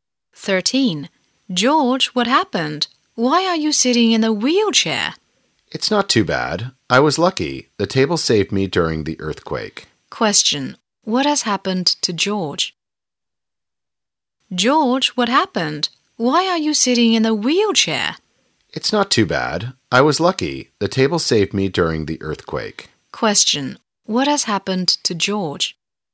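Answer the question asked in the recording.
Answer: He was hurt in an earthquake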